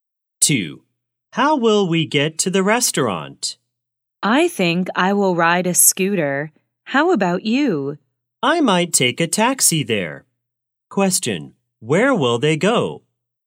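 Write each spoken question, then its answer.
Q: Question, where will they go?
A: To the restaurant.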